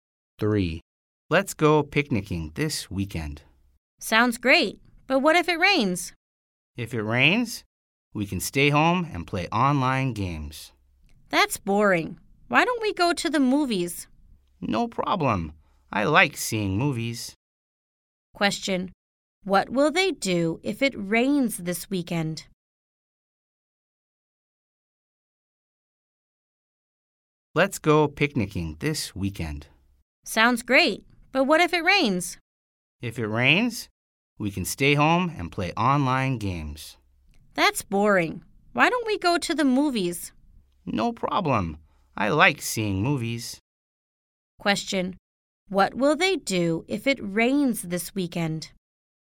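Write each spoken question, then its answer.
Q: What will they do if it rains this weekend?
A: Go to the movies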